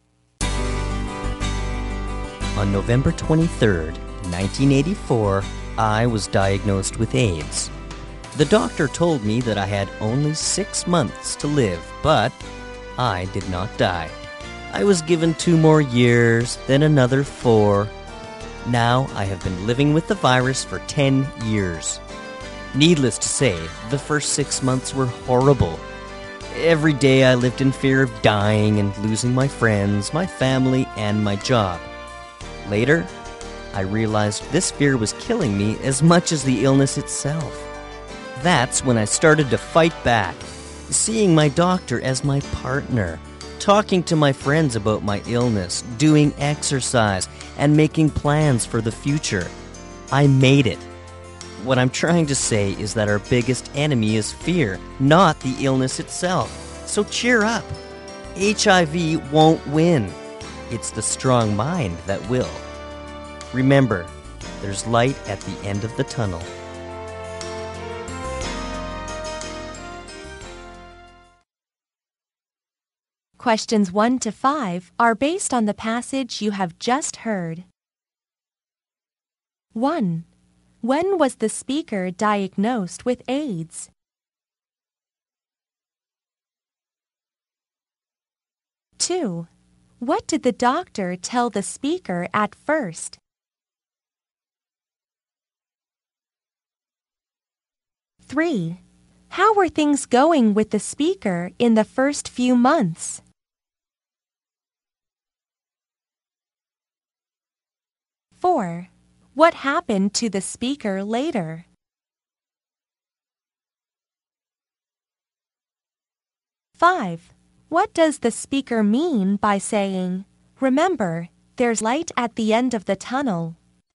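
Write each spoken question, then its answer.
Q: When was the speaker diagnosed with AIDS?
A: On November 23rd, 1984

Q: What did the doctor tell the speaker at first?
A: That he had only 6 months to live

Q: How were things going with the speaker in the first few months?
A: Horribly; he lived in fear of dying and losing friends, family and job

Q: What happened to the speaker later?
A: He realized fear was killing him and started to fight back

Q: What does the speaker mean by saying, "Remember, there's light at the end of the tunnel"?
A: There is hope; a strong mind can win over the illness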